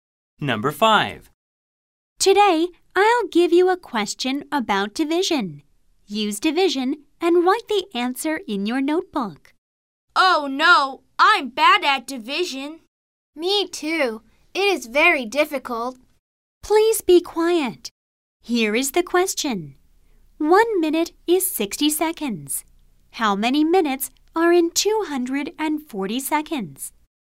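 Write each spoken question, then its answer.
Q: 1 minute is 60 seconds. How many minutes are in 240 seconds?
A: 4 minutes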